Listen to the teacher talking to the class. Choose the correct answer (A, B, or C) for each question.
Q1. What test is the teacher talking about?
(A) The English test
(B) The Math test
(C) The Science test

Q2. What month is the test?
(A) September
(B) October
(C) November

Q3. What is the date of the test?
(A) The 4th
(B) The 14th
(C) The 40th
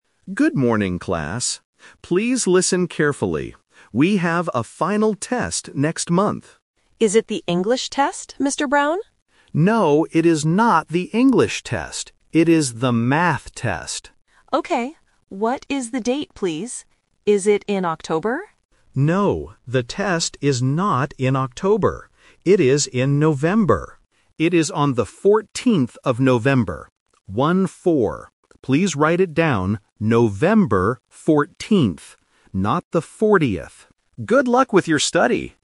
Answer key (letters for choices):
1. B
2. C
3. B

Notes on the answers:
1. The student asks if it is the English test (Option A is the trap). The teacher says, "No, it is not the English test. It is the Math test." Option C (Science test) is never mentioned.
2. The student asks, "Is it in October?" (Option B is the trap). The teacher explicitly says, "No, the test is not in October. It is in November." Option A (September) is a plausible month but is not mentioned.
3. The teacher states clearly, "It is on the 14th of November," and repeats "One-four." Option C (The 40th) is a phonetic trap, and the teacher even jokes "Not the 40th" to help students distinguish the sound. Option A (The 4th) is a single-digit trap.

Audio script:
Teacher: Good morning, class. Please listen carefully. We have a final test next month.
Student: Is it the English test, Mr. Brown?
Teacher: No, it is not the English test. It is the Math test.
Student: Okay. What is the date, please? Is it in October?
Teacher: No, the test is not in October. It is in November.
Teacher: It is on the 14th of November. Please write it down: November 14th. Not the 40th.
Teacher: Good luck with your study!